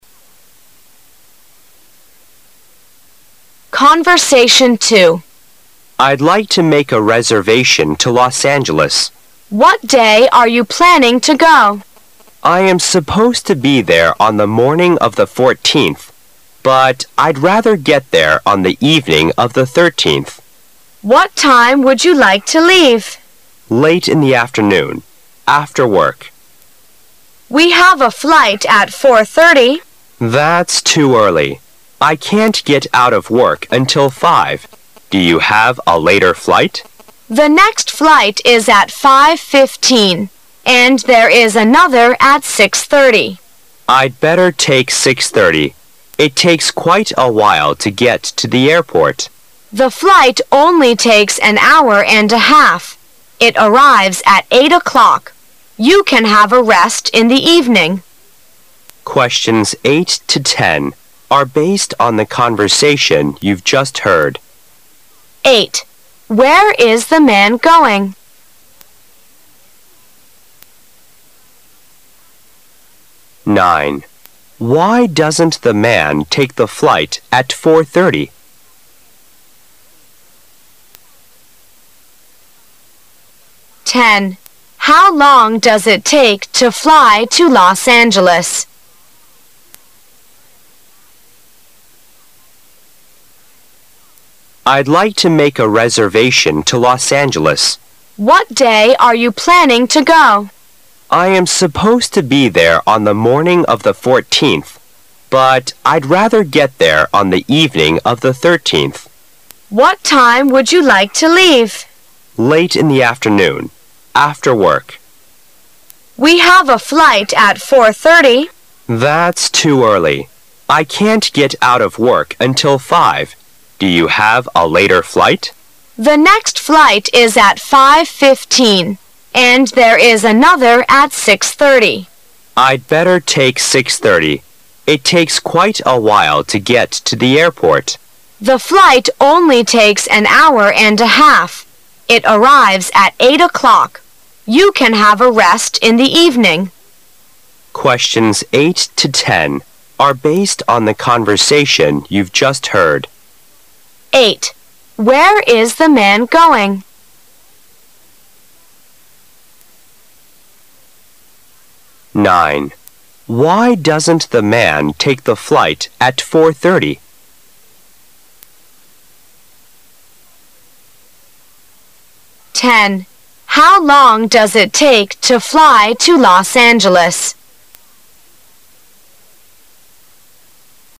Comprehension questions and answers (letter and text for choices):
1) Why doesn't the man take the flight at 4:30?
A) Because he has to pick up his wife at home.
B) Because he wants to buy something in the department store.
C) Because he won't be out of work at that time.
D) Because he doesn't like to arrive in the evening.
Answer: C) Because he won't be out of work at that time.

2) How long does it take to fly to Los Angeles?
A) Eight hours.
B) Two hours.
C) An hour and a half.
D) Half an hour.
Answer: C) An hour and a half.

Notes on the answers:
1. 根据女士提供的航班信息,有a flight at 4:30可以选择,但男土觉得That's too early.I can't get out of work until five,所以可以得出男士小坐这个航班的原因足他还没有下班。
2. 男士决定I'd better take 6:30,这样他可以从容地赶到机场,女士将航班的行程时间告诉了他The flight only takes an hour and a half,而巳根据后面说到的It arrives at 8:00也可以推算出整个行程用—个半小时的时间、